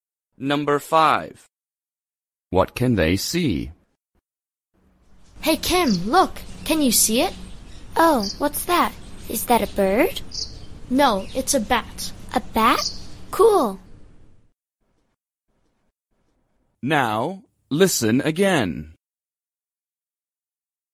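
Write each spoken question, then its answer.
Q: What can they see?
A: a bat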